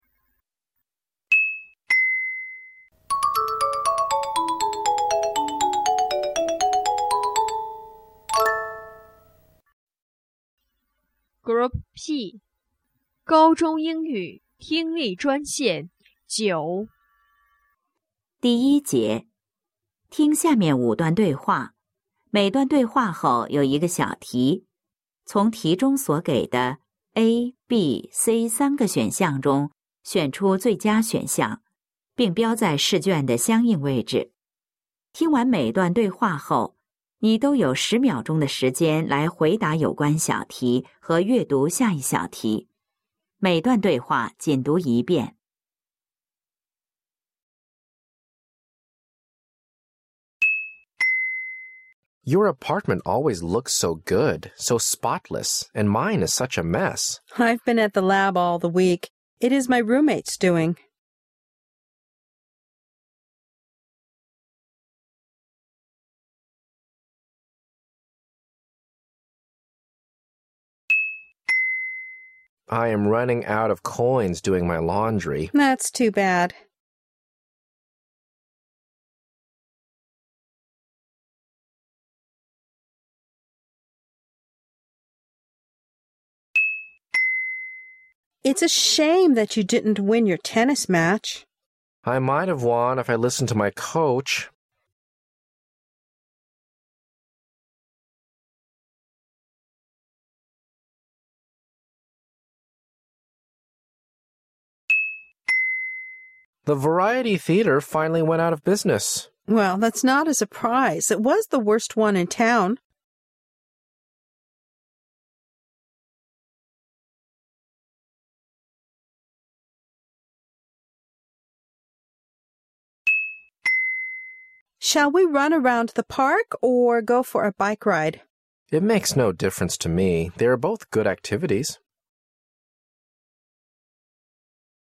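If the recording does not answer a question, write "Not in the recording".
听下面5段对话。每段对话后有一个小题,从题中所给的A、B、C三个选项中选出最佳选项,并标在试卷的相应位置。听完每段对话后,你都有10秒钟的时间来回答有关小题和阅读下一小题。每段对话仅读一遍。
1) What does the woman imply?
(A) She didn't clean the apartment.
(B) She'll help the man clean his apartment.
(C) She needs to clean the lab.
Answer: She didn't clean the apartment.

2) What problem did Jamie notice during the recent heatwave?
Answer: Not in the recording

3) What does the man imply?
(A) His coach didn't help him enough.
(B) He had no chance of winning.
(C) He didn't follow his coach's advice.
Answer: He didn't follow his coach's advice.

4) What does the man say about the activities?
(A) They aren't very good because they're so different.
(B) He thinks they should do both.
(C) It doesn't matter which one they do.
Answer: It doesn't matter which one they do.

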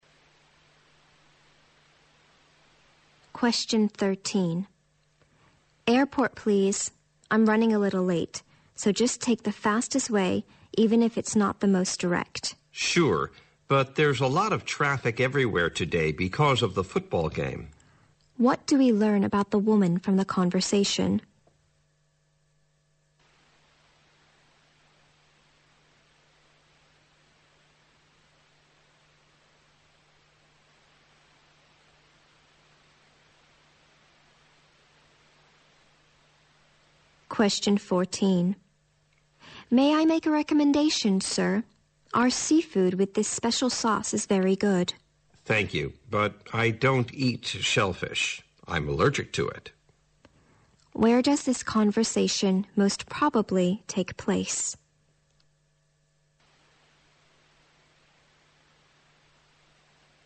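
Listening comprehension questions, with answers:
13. What do we learn about the woman from the conversation?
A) She wants to take the most direct way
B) She may be late for the football game.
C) She is worried about missing her flight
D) She is currently caught in a traffic jam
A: She is worried about missing her flight

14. Where does this conversation most probably take place?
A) At a restaurant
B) In a fish shop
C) At a clinic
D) On a fshing boat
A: At a restaurant

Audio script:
W: Airport, please. I'm running a little late. So just take the fastest way even if it's not the most direct.
M: Sure, but there is a lot of traffic everywhere today because of the football game.
Q: What do we learn about the woman from the conversation?
W: May I make a recommendation, sir? Our seafood with this special sauce is very good.
M: Thank you, but I don't eat shellfish. I'm allergic to it.
Q: Where does this conversation most probably take place?

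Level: 大学英语四级

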